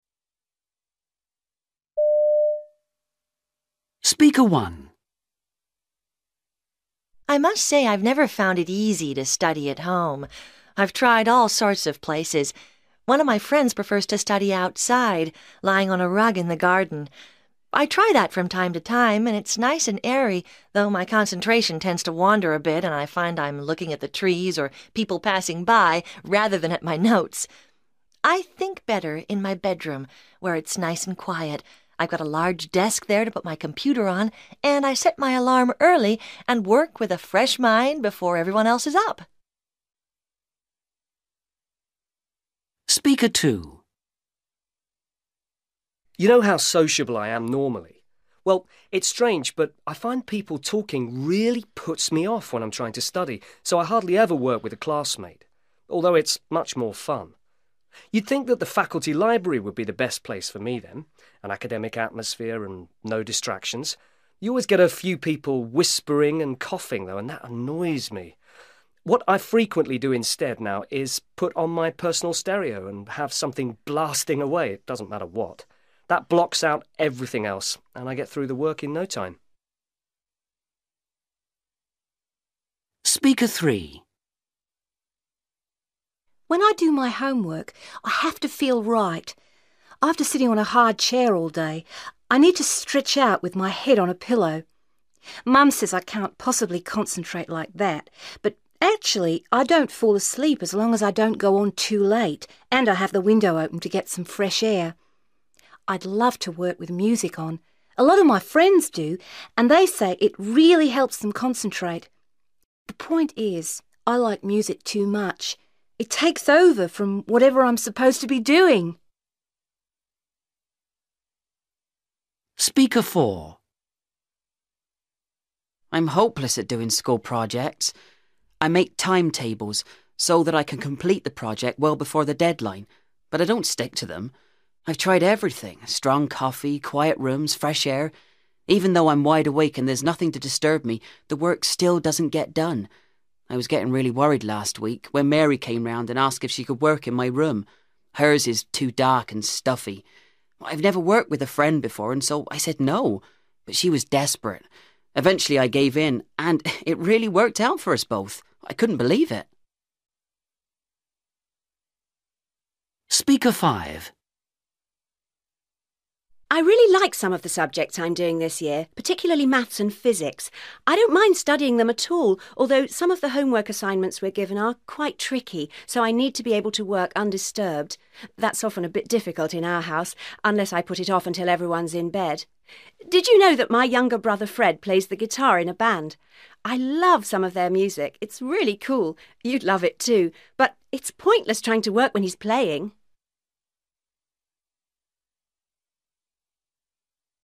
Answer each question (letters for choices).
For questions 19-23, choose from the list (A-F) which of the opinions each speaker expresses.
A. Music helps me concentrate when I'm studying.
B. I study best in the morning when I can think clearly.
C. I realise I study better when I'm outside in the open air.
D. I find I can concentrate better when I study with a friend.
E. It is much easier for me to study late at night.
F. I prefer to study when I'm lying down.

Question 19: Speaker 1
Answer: B

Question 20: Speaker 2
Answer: A

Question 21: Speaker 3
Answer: F

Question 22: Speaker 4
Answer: D

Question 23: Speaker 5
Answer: E

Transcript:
Girl: I must say, I've never found it easy to study at home. I've tried all sorts of places. One of my friends prefers to study outside, lying on a rug in the garden. I try that from time to time and it's nice and airy, though my concentration tends to wander a bit and I find I'm looking at the trees, or people passing by, rather than at my notes. I think better in my bedroom, where it's nice and quiet. I've got a large desk there to put my computer on, and I set my alarm early and work with a fresh mind before everyone else's up.
Boy: You know how sociable I am normally? Well, it's strange but I find people talking really puts me off when I'm trying to study, so I hardly ever work with a classmate, although it's much more fun. You'd think that the faculty library would be the best place for me then – an academic atmosphere and no distractions. You always get a few people whispering and coughing though and that annoys me. What I frequently do instead now is put on my personal stereo and have something blasting away, it doesn't matter what. That blocks out everything else and I get through the work in no time.
Girl: When I do my homework I have to feel right. After sitting on a hard chair all day, I need to stretch out with my head on a pillow. Mum says I cannot possibly concentrate like that, but actually I don't fall asleep as long as I don't go on too late and I have the window open to get some fresh air. I'd love to work with music on, a lot of my friends do, and they say it really helps them concentrate. The point is I like music too much – it takes over from whatever I'm supposed to be doing.
Boy: I'm hopeless at doing school projects. I make timetables so that I can complete the project well before the deadline, but I don't stick to them. I've tried everything – strong coffee, quiet rooms, fresh air. Even though I'm wide awake and there's nothing to disturb me, the work still doesn't get done. I was getting really worried last week, when Mary came round and asked if she could work in my room – hers is too dark and stuffy. I've never worked with a friend before and so I said 'No', but she was desperate. Eventually, I gave in and it really worked out for us both. I couldn't believe it!
Girl: I really like some of the subjects I'm doing this year, particularly maths and physics. I don't mind studying them at all, although some of the homework assignments we're given are quite tricky, so I need to be able to work undisturbed. That's often a bit difficult in our house, unless I put it off until everyone's in bed. Did you know that my younger brother, Fred, plays the guitar in a band? I love some of their music, it's really cool, you'd love it too, but it's pointless trying to work when he's playing.